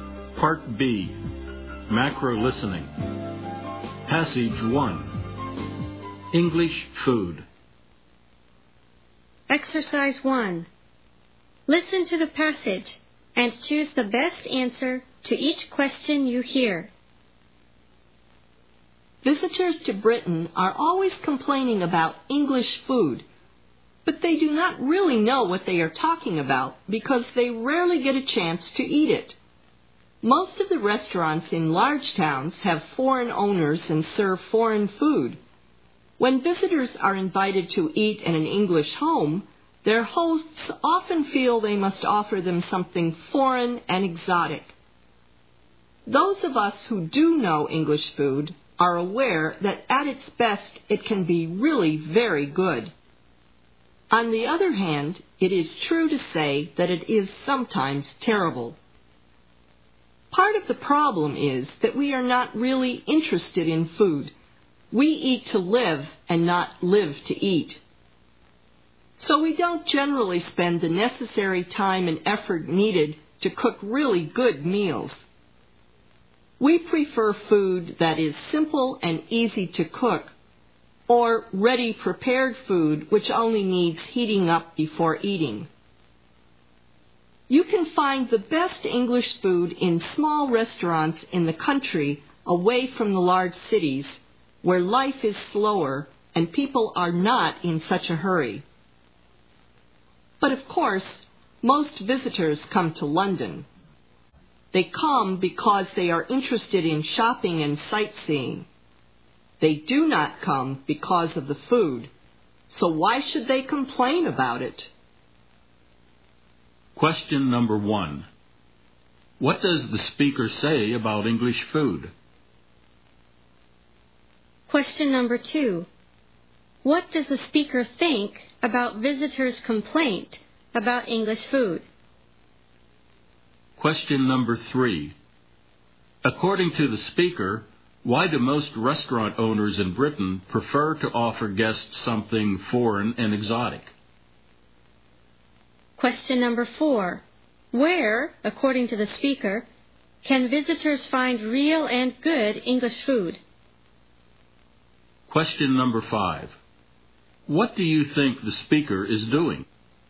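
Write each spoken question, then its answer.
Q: What does the speaker say about English food?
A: At its best it can be very good, but sometimes it is terrible.

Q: What does the speaker think about visitors' complaint about English food?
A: It is unfair; they rarely get a chance to eat real English food.

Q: Where, according to the speaker, can visitors find real and good English food?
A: In small country restaurants away from the large cities.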